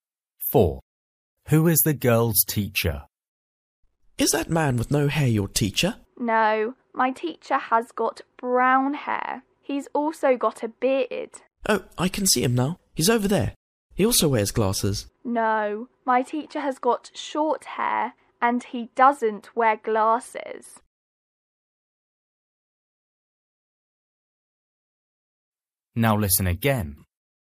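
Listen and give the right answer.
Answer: The man with short brown hair and a beard, without glasses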